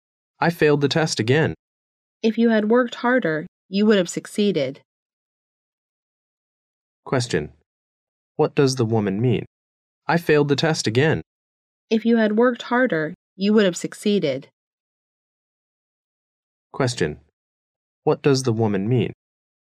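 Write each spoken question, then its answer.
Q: What does the woman mean?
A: The man didn't work hard enough, so he failed.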